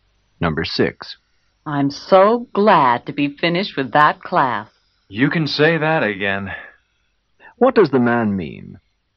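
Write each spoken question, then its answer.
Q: What does the man mean?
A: He is also glad to be finished with the class.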